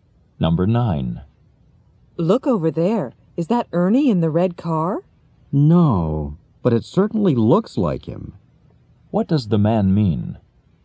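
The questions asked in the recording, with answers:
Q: What does the man mean?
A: It isn't Ernie, but it looks like him.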